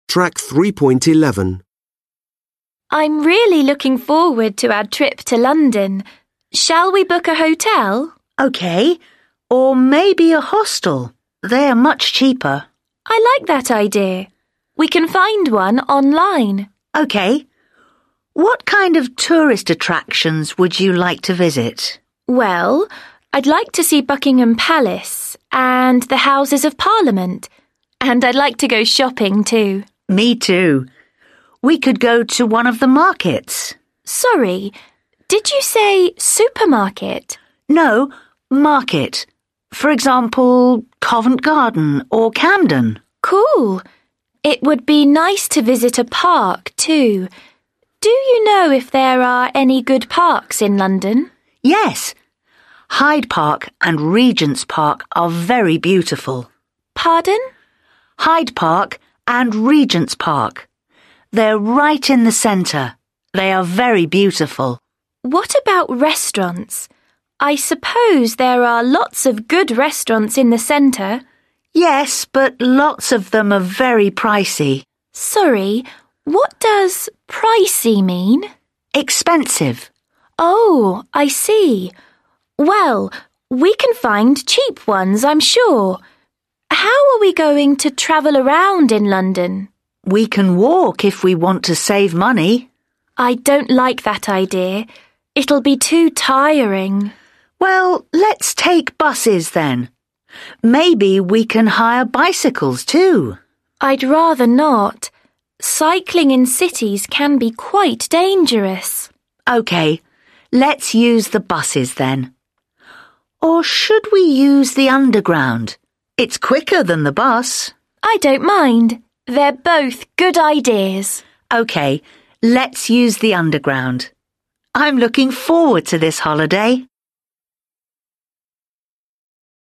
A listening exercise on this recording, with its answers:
Read the Speaking Strategy. Then listen to another candidate doing the task in exercise 3. How many times does the candidate ask for clarification? Which words did she not understand?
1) How many times does the candidate ask for clarification?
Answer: She asks three times.

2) Which words did she not understand?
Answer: She didn't understand 'market' and 'pricey'

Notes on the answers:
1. – Sorry, did you say 'supermarket'? – Sorry, what does 'pricey' mean? – Pardon?

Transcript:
Candidate: I'm really looking forward to our trip to London. Shall we book a hotel?
Examiner: OK. Or maybe a hostel. They are much cheaper.
Candidate: I like that idea. We can find one online.
Examiner: OK. What kind of tourist attractions would you like to visit?
Candidate: Well, I'd like to see Buckingham Palace and the Houses of Parliament. And I'd like to go shopping, too.
Examiner: Me, too. We could go to one of the markets.
Candidate: Sorry, did you say 'supermarket'?
Examiner: No, 'market'. For example, Covent Garden or Camden.
Candidate: Cool. It would be nice to visit a park, too. Do you know if there are any good parks in London?
Examiner: Yes, Hyde Park and Regents Park are very beautiful.
Candidate: Pardon?
They're right in the centre.
I suppose there are lots of good restaurants in the centre.
Examiner: Yes, but lots of them are very pricey.
Candidate: Sorry, what does 'pricey' mean?
Examiner: Expensive.
Candidate: Oh, I see. Well, we can find cheap ones, I'm sure. How are we going to travel around in London?
Examiner: We can walk if we want to save money.
Candidate: I don't like that idea. It'll be too tiring.
Examiner: Well, let's take buses, then. Maybe we can hire bicycles, too.
Candidate: I'd rather not. Cycling in cities can be quite dangerous.
Examiner: OK, let's use the buses, then. Or should we use the underground? It's quicker than the bus.
Candidate: I don't mind. They're both good ideas.
Examiner: OK. Let's use the underground. I'm looking forward to this holiday!

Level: Lớp 10